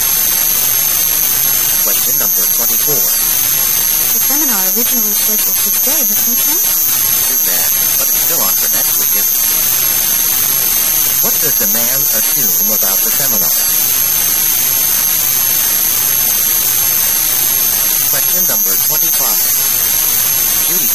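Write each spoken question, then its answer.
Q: What does the man assume about the seminar?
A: It will be held next week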